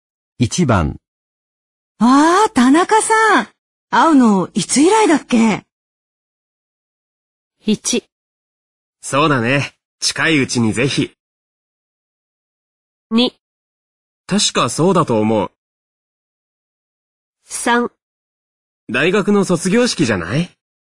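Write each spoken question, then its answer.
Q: ああ、田中さん。会うの、いつ以来だっけ?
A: 3: 大学の卒業式じゃない?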